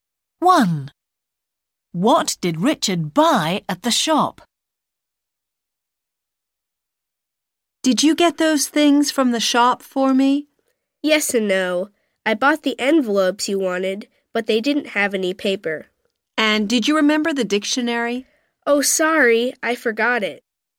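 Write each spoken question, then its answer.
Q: What did Richard buy at the shop?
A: envelopes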